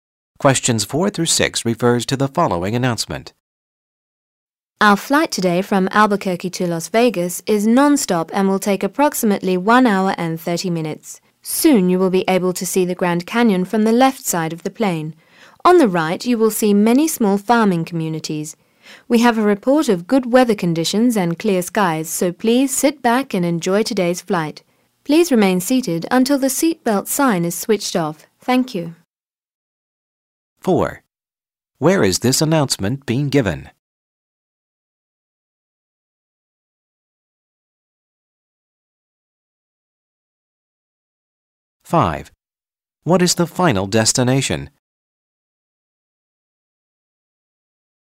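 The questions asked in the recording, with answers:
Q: Where is this announcement being given?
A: On an airplane

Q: What is the final destination?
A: Las Vegas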